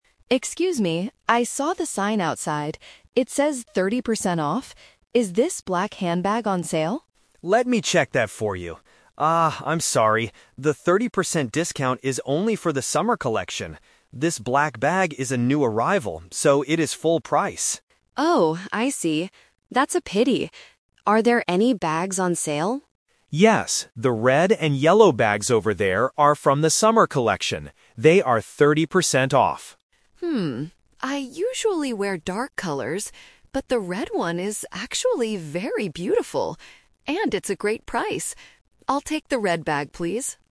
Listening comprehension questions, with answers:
Listen to the conversation between a customer and a shop assistant. Choose the correct answer (A, B, or C).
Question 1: Why doesn't the black bag get a 30% discount?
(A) Because it is a new arrival.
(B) Because it is from the summer collection.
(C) Because it is broken.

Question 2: Which bags are on sale right now?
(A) All the bags in the store.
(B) The black bags only.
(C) The red and yellow bags.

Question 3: What does the customer decide to buy at the end?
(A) The black bag.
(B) The red bag.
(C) She doesn't buy anything.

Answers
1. (A) Because it is a new arrival.
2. (C) The red and yellow bags.
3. (B) The red bag.

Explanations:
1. Brian says, "This black bag is a new arrival, so it is full price." Option (B) is the trap; the summer collection does get the discount, but the black bag is not from that collection. Option (C) is a plausible reason for a discount in some stores, but it is not mentioned here.
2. Brian clearly states, "the red and yellow bags over there are from the summer collection. They are thirty percent off." Option (A) is incorrect because the new arrivals are full price. Option (B) is the trap because the customer asked about it first, but it is not on sale.
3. This is "The Twist". Alice originally wanted the black bag (Option A - the trap). She says she usually wears dark colors, "BUT the red one is actually very beautiful... I'll take the red bag, please." Option (C) is incorrect because she makes a purchase at the end.

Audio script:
Alice: Excuse me, I saw the sign outside. It says thirty percent off. Is this black handbag on sale?
Brian: Let me check that for you. Ah, I'm sorry. The thirty percent discount is only for the summer collection. This black bag is a new arrival, so it is full price.
Alice: Oh, I see. That's a pity. Are there any bags on sale?
Brian: Yes, the red and yellow bags over there are from the summer collection. They are thirty percent off.
I usually wear dark colors, but the red one is actually very beautiful. And it's a great price. I'll take the red bag, please.

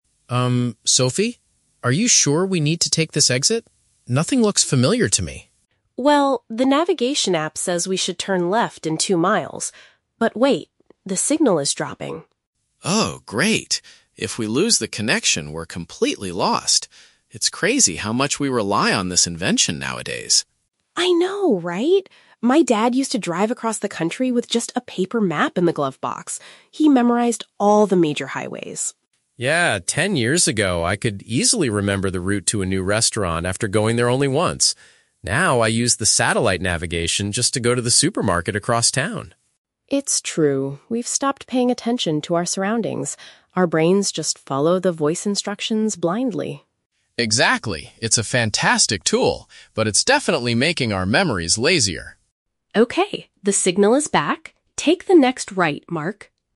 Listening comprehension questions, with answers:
Listen to a conversation between two friends in a car. For each question, choose the correct answer (A, B, or C).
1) What problem are Mark and Sophie currently facing on their trip?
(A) They have run out of gas on the highway.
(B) Their digital map is losing its internet connection.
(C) They are using an outdated paper map to find the way.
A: (B) Their digital map is losing its internet connection.

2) How has Mark's driving habit changed over the years?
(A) He now needs electronic guidance for very familiar, short trips.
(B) He used to drive across the country without any help.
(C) He currently memorizes the routes to new restaurants.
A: (A) He now needs electronic guidance for very familiar, short trips.

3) What is the speakers' main complaint about GPS technology?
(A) It frequently gives drivers incorrect voice instructions.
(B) It causes people to observe less and forget things easily.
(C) It has become too expensive for everyday use.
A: (B) It causes people to observe less and forget things easily.

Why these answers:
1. Sophie says, "the navigation app... the signal is dropping" and Mark mentions "If we lose the connection". Option (B) paraphrases this situation perfectly. Option (A) is a plausible car problem but not mentioned. Option (C) is a trap; a "paper map" is mentioned, but it was what Sophie's dad used in the past, not what they are using now.
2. Mark states, "Now, I use the satellite navigation just to go to the supermarket across town!" Option (A) summarizes this idea using synonyms ("electronic guidance" for satellite navigation, "familiar, short trips" for going to the supermarket). Option (B) is a trap; Sophie's dad drove across the country, not Mark. Option (C) is a trap; Mark used to memorize routes ten years ago, not currently.
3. Sophie says, "We've stopped paying attention to our surroundings" and Mark adds that it is "making our memories lazier." Option (B) paraphrases "stopped paying attention" to "observe less" and "memories lazier" to "forget things easily." Option (A) is a trap; they mention following "voice instructions", but they never say the instructions are incorrect. Option (C) is not mentioned in the audio.

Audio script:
Are you sure we need to take this exit? Nothing looks familiar to me.
Sophie: Well, the navigation app says we should turn left in two miles. But wait... the signal is dropping.
Mark: Oh, great. If we lose the connection, we're completely lost. It's crazy how much we rely on this invention nowadays.
Sophie: I know, right? My dad used to drive across the country with just a paper map in the glove box. He memorized all the major highways.
Mark: Yeah, ten years ago, I could easily remember the route to a new restaurant after going there only once. Now, I use the satellite navigation just to go to the supermarket across town!
Sophie: It's true. We've stopped paying attention to our surroundings. Our brains just follow the voice instructions blindly.
Mark: Exactly. It's a fantastic tool, but it's definitely making our memories lazier.

